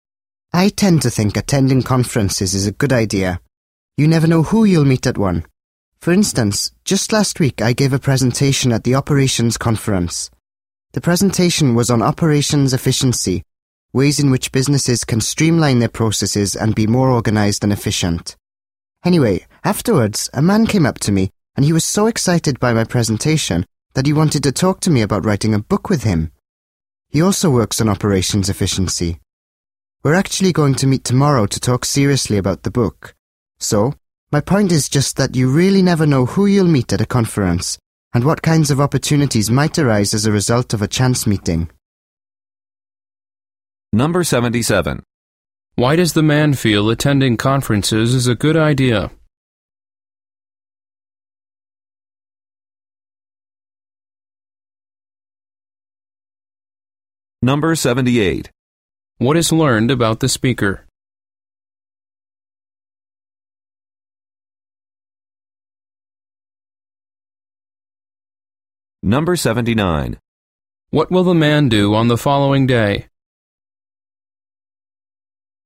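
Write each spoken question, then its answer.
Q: Why does the man feel attending conferences is a good idea?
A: You never know who you'll meet or what opportunities might come up

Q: What will the man do on the following day?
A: Meet a man to talk about writing a book together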